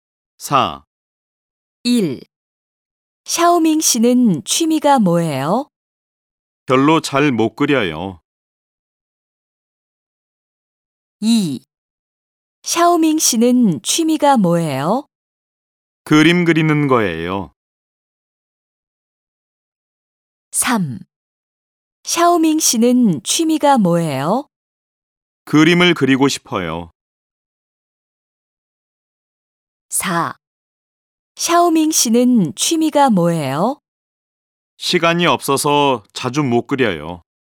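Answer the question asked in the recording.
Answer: 2: 그림 그리는 거예요.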